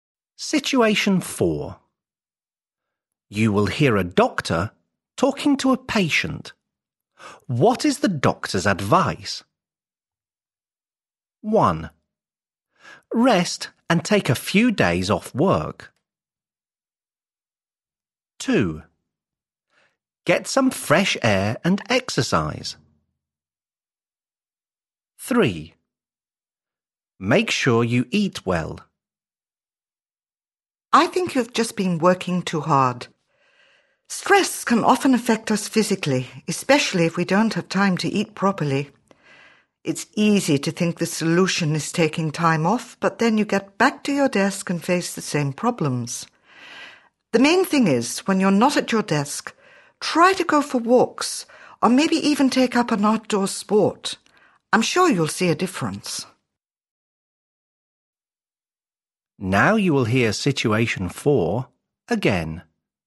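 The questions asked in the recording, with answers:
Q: What is the doctor's advice?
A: 2: Get some fresh air and exercise.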